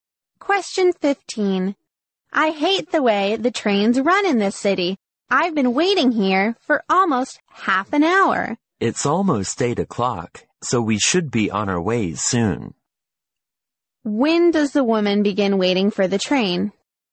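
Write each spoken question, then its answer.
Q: When does the woman begin waiting for the train?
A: At about 7:30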